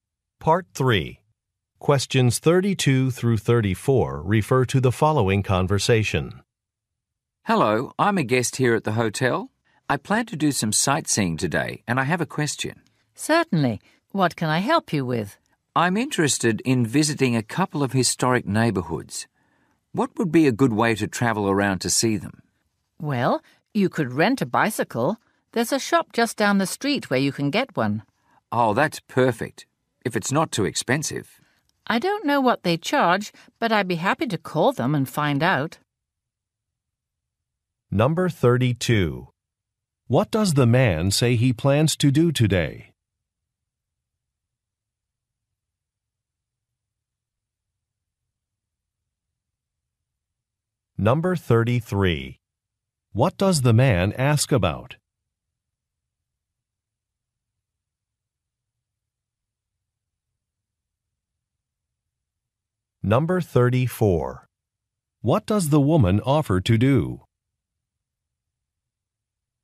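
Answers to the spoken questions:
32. Go sightseeing
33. A good way to travel around to see historic neighbourhoods
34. Call the bicycle shop to find out the price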